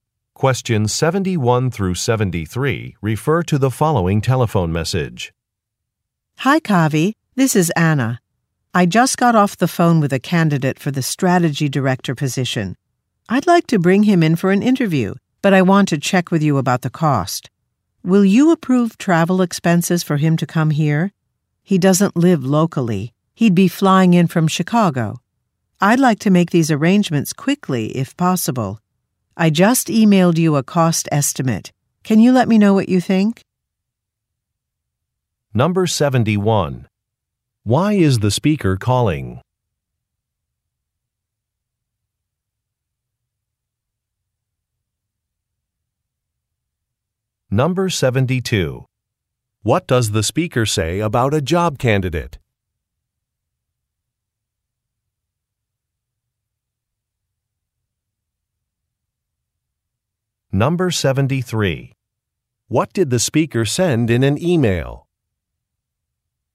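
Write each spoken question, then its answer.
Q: Why is the speaker calling?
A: To request approval of travel expenses for a job candidate

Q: What does the speaker say about a job candidate?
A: He doesn't live locally; he would fly in from Chicago

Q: What did the speaker send in an email?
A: A cost estimate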